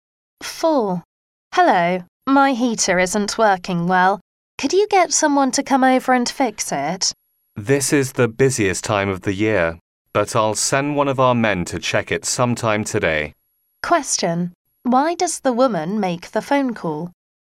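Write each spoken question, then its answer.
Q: Why does the woman make the phone call?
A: To get her heater repaired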